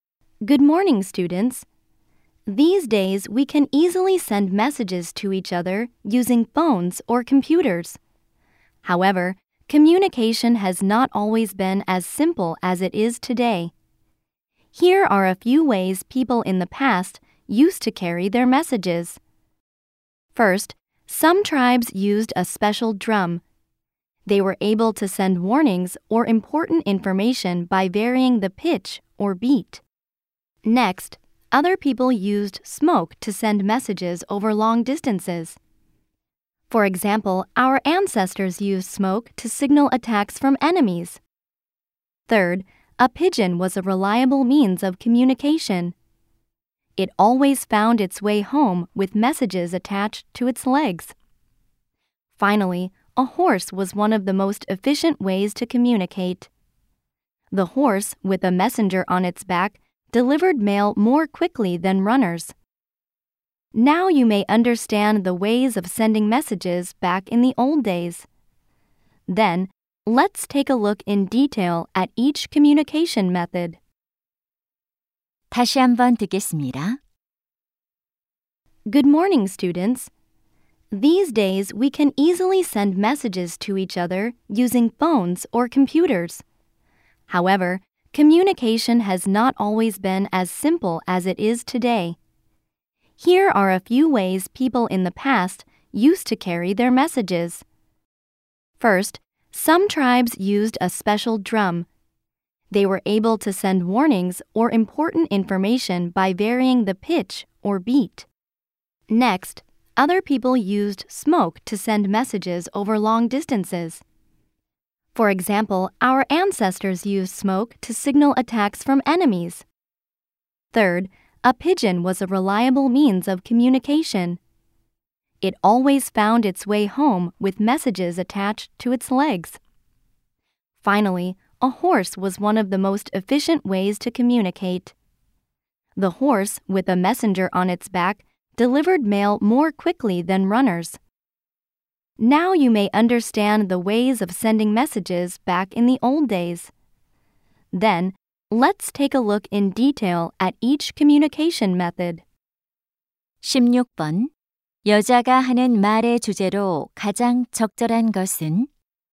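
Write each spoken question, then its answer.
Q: 여자가 하는 말의 주제로 가장 적절한 것은?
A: 과거에 사람들이 메시지를 전달하던 방법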